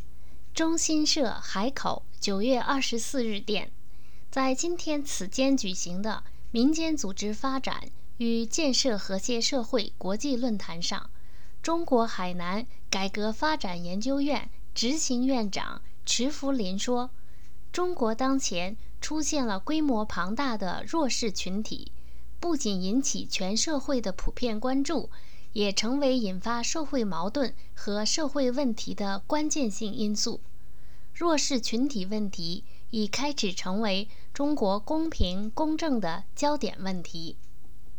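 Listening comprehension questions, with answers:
Please answer the following questions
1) 什么是中国目前公平、公正的焦点问题?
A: 弱势群体问题

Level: 3rd Year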